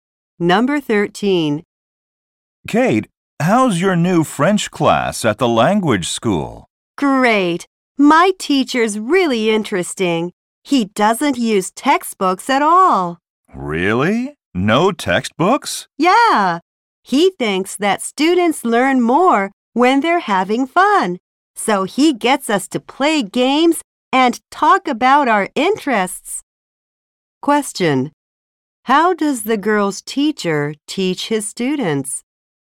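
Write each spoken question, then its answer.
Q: How does the girl's teacher teach his students?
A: He uses games and talks about their interests, with no textbooks.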